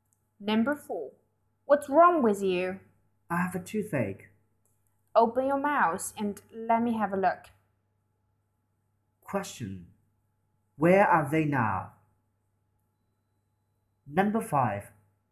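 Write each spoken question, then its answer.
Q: Where are they now?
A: In a hospital (dentist's).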